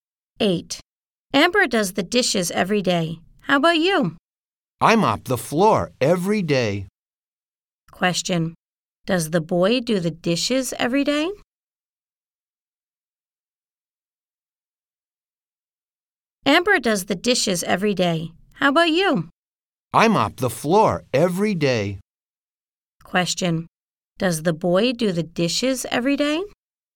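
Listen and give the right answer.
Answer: No, he mops the floor every day.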